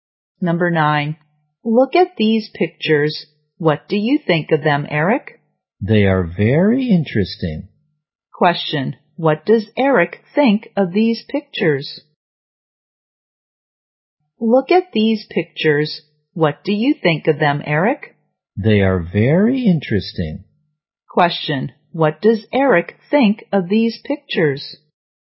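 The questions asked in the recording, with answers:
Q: What does Eric think of these pictures?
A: They are very interesting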